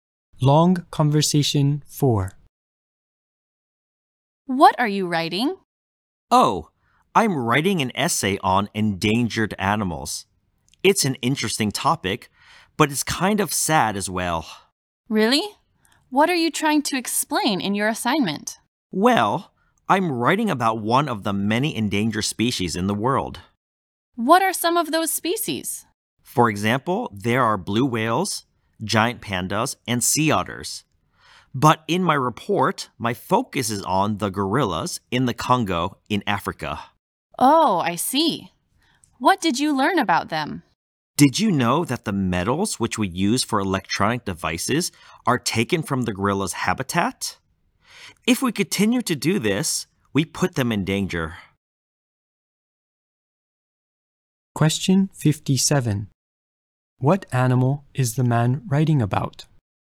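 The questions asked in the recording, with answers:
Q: What animal is the man writing about?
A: Gorillas in the Congo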